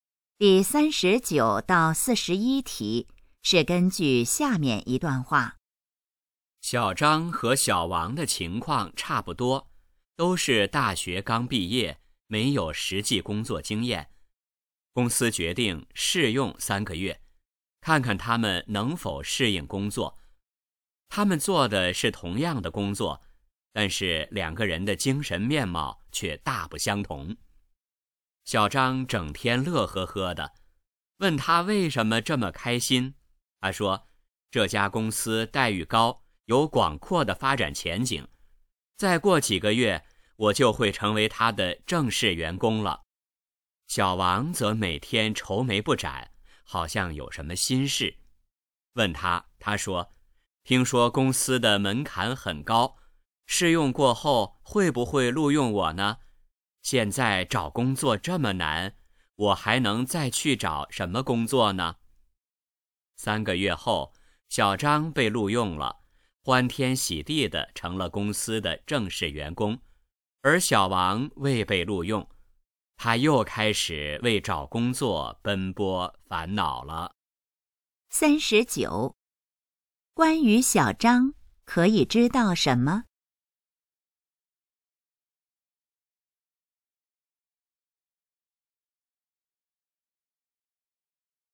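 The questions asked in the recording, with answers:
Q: 小王在担心什么?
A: 试用后会不会被录用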